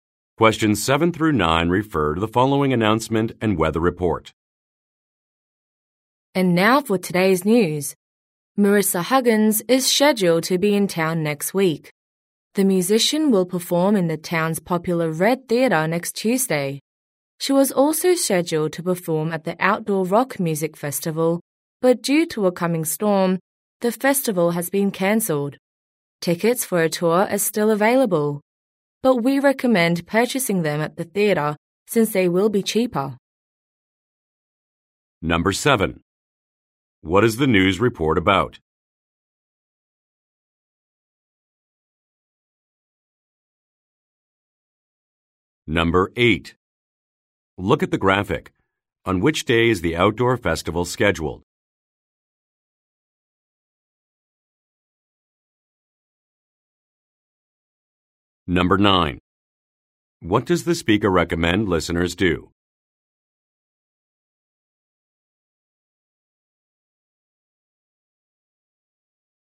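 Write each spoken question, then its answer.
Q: What is the news report about?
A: A musician, Marissa Huggins, performing in town

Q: What does the speaker recommend listeners do?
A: Buy tickets at the theatre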